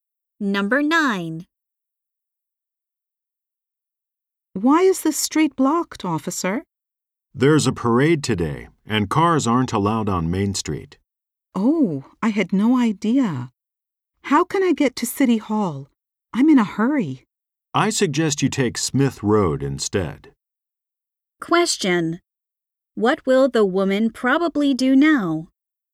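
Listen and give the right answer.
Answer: Take Smith Road.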